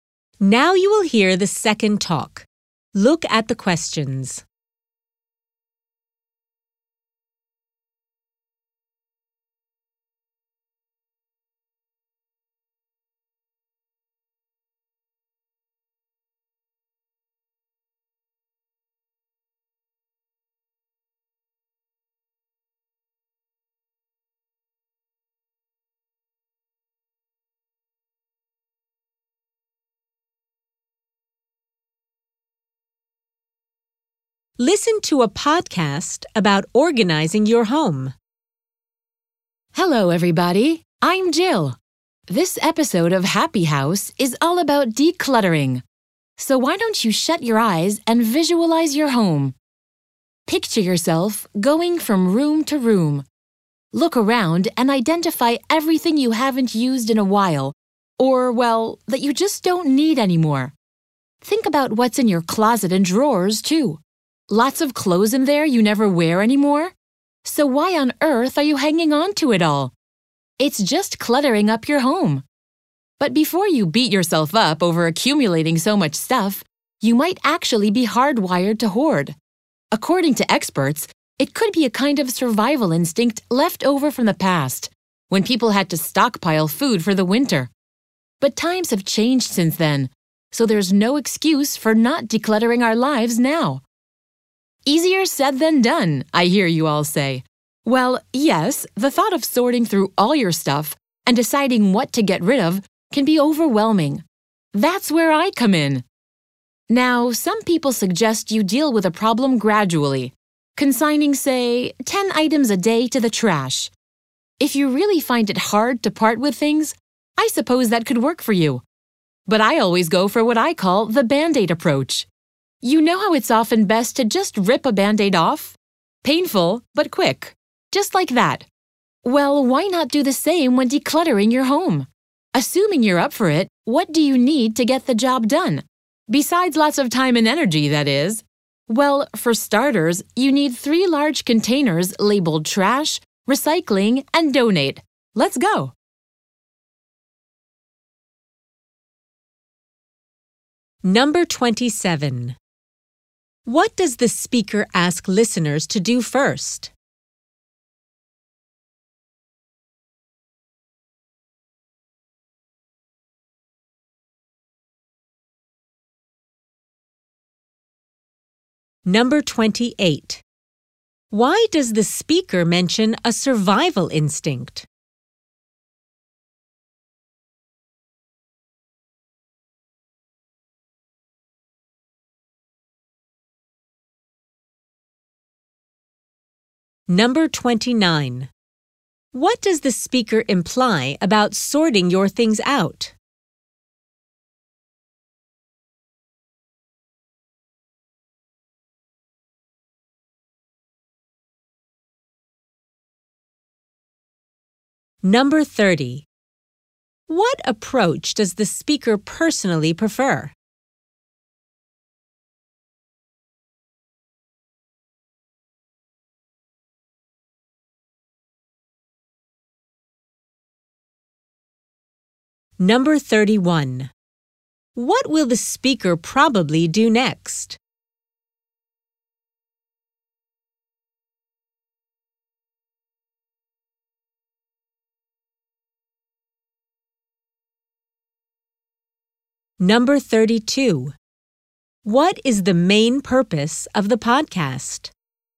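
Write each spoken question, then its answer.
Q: What does the speaker ask listeners to do first?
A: Shut their eyes and picture their home

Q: Why does the speaker mention a survival instinct?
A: To explain why people tend to hoard things

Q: What approach does the speaker personally prefer?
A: Decluttering quickly, all at once (the Band-Aid approach)

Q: What is the main purpose of the podcast?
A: To give advice on decluttering your home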